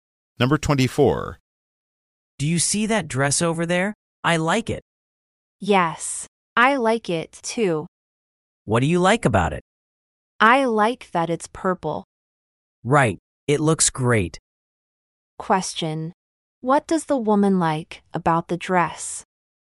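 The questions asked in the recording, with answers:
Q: What does the woman like about the dress?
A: It's purple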